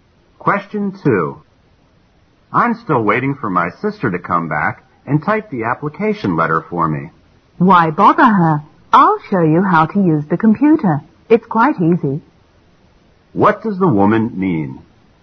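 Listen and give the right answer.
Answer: She will show him how to use the computer to type the letter himself

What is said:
M: I'm still waiting for my sister to come back and type the application letter for me.
W: Why bother her. I'll show you how to use the computer. It's quite easy.
Q: What does the woman mean?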